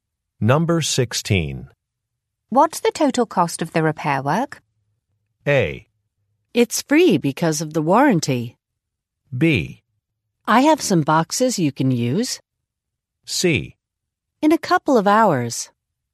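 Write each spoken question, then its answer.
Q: What's the total cost of the repair work?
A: A: It's free because of the warranty.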